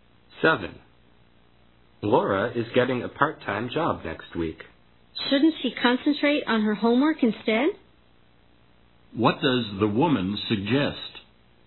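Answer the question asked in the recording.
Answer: Laura should concentrate on her homework instead of a part-time job.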